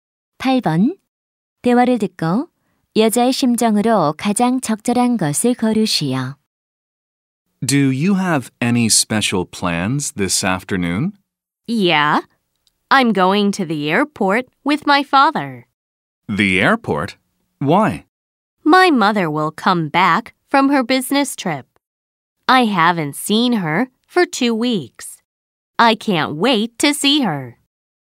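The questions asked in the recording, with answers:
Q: 대화를 듣고 여자의 심정으로 가장 적절한 것을 고르시오.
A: 설렘, 기대됨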